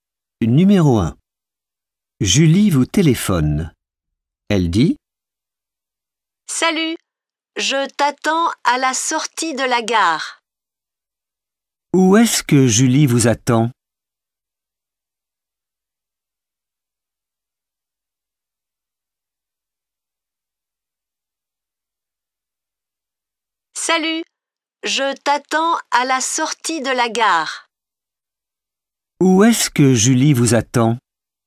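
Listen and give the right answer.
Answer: À la sortie de la gare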